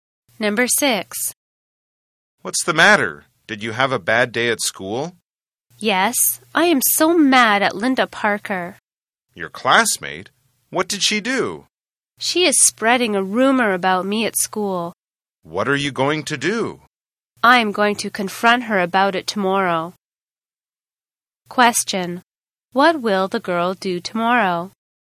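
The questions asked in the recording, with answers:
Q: What will the girl do tomorrow?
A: Confront Linda Parker about the rumor she is spreading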